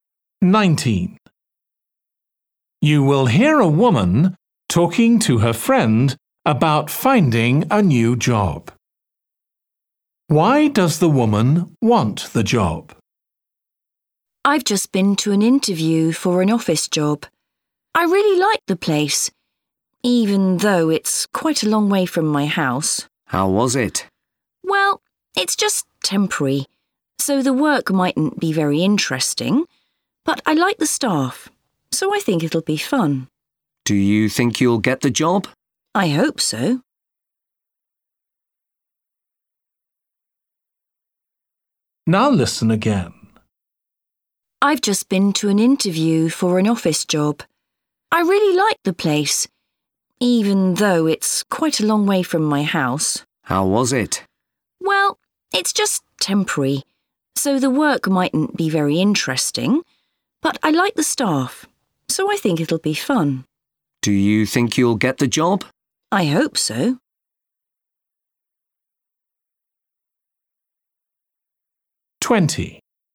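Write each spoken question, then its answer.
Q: Why does the woman want the job?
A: She likes the staff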